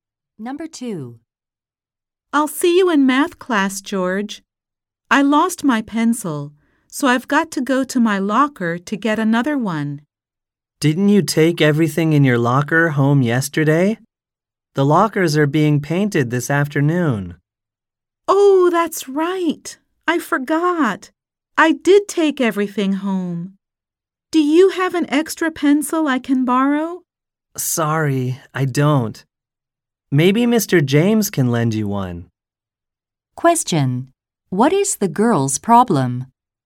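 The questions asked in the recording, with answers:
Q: What is the girl's problem?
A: She needs a pencil but has none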